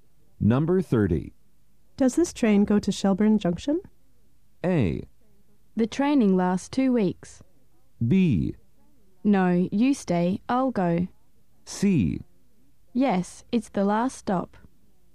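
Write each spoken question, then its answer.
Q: Does this train go to Shelburne Junction?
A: C: Yes, it's the last stop.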